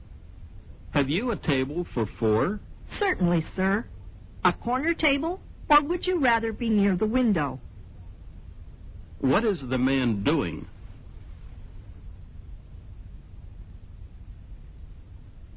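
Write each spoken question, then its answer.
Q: What is the man doing?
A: Asking for a table for four in a restaurant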